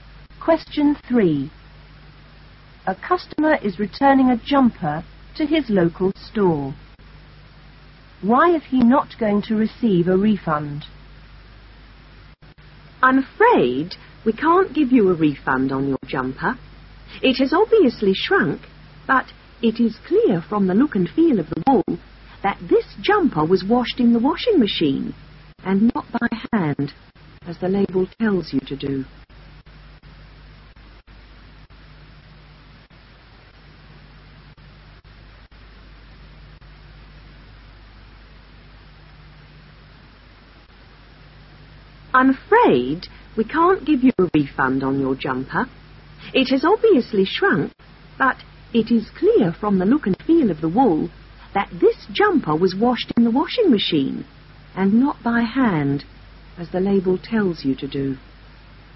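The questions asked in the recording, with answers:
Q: Why is he not going to receive a refund?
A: He washed the jumper in the washing machine instead of by hand, as the label says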